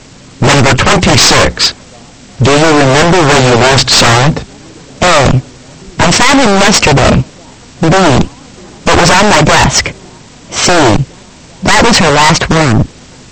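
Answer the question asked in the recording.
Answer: B: It was on my desk.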